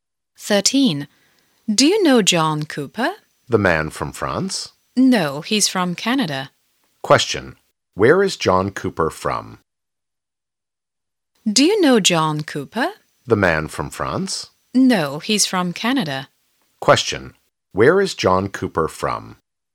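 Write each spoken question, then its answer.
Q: Where is John Cooper from?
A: Canada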